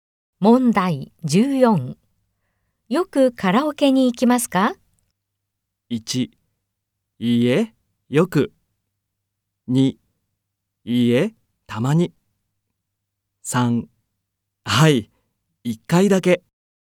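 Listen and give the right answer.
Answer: 2: いいえ、たまに。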